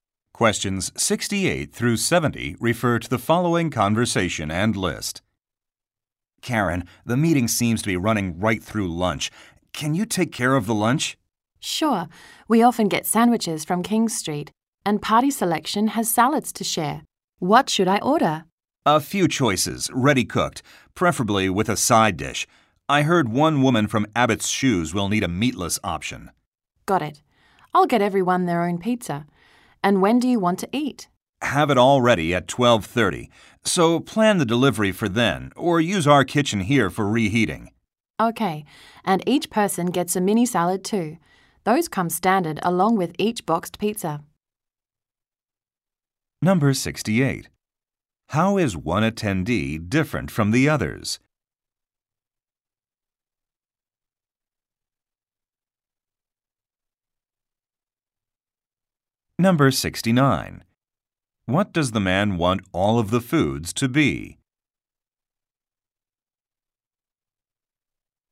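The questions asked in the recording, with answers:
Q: How is one attendee different from the others?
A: She needs a meatless (vegetarian) option.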